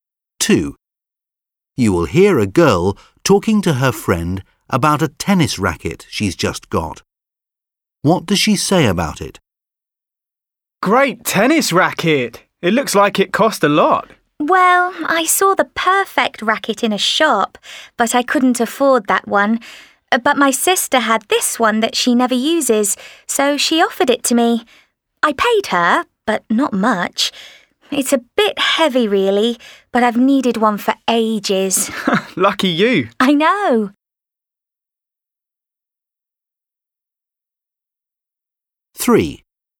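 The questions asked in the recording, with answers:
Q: What does she say about it?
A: She bought it cheaply from her sister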